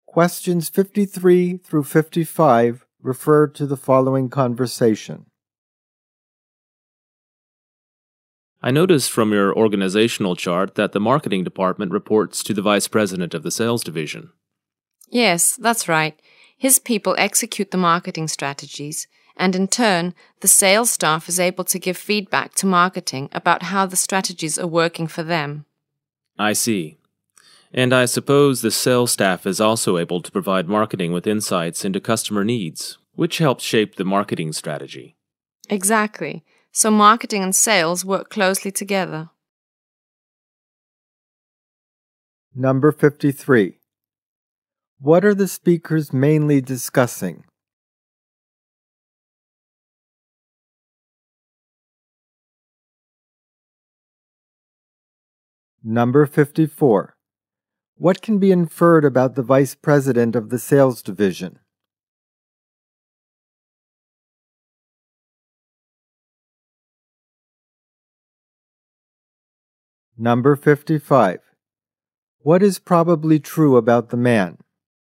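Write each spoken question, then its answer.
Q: What are the speakers mainly discussing?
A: How the marketing and sales departments are organized and work together

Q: What can be inferred about the vice president of the sales division?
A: The marketing department reports to him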